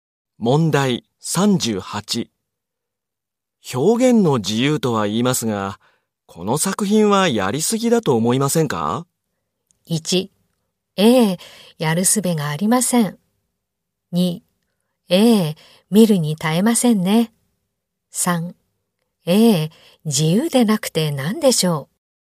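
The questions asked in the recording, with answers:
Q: 表現の自由とは言いますが、この作品はやりすぎだと思いませんか?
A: 2: ええ、見るに耐えませんね。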